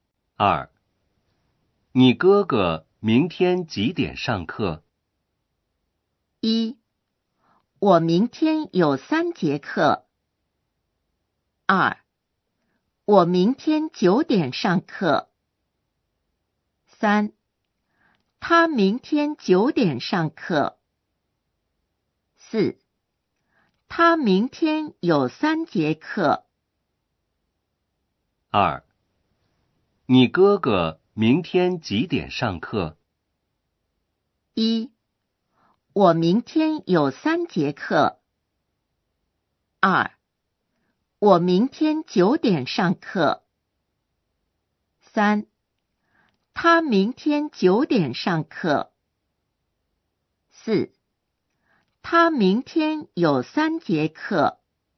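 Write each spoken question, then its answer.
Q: 你哥哥明天几点上课?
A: 3: 他明天九点上课。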